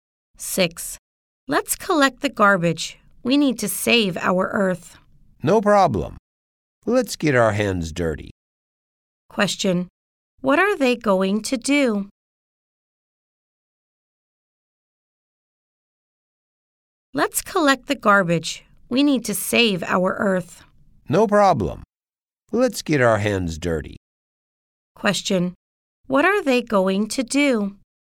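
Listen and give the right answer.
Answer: Collect the garbage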